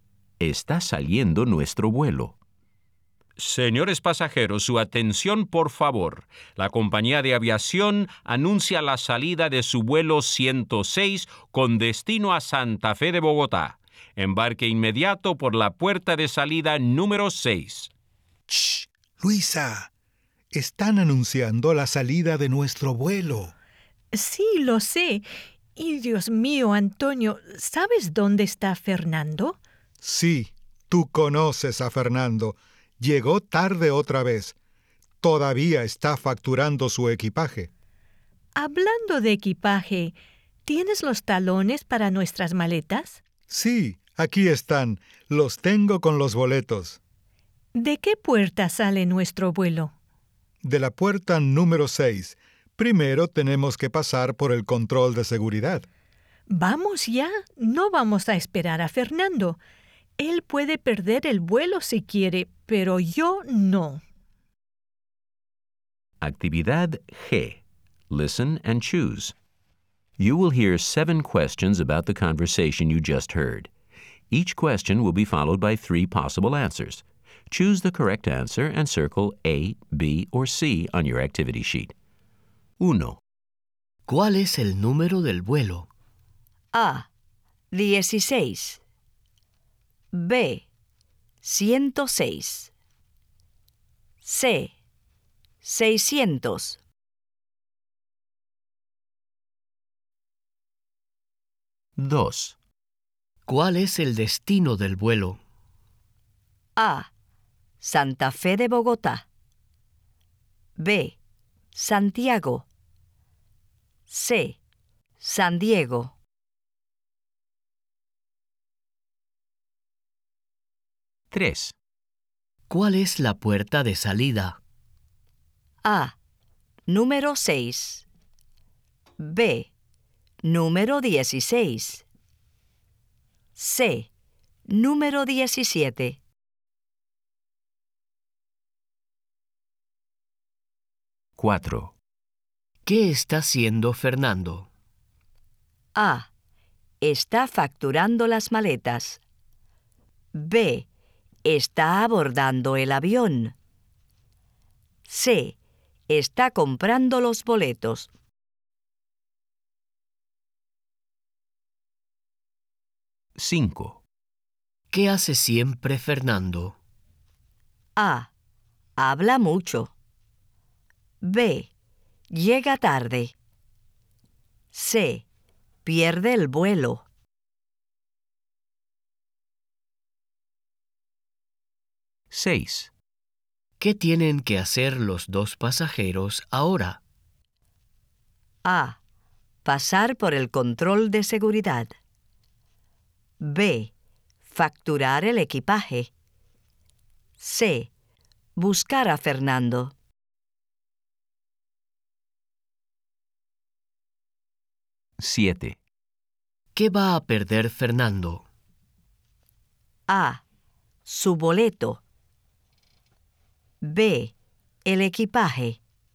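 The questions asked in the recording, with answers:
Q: ¿Cuál es el número del vuelo?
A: B: 106

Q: ¿Cuál es el destino del vuelo?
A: A: Santa Fe de Bogotá

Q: ¿Cuál es la puerta de salida?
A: A: Número 6

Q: ¿Qué está haciendo Fernando?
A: A: Está facturando las maletas

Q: ¿Qué hace siempre Fernando?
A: B: Llega tarde

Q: ¿Qué tienen que hacer los dos pasajeros ahora?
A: A: Pasar por el control de seguridad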